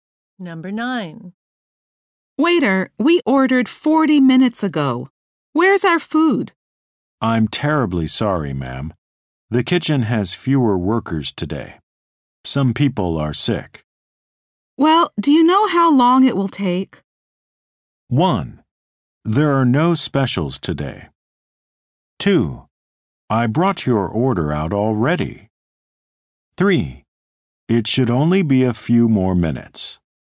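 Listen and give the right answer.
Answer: 3: It should only be a few more minutes.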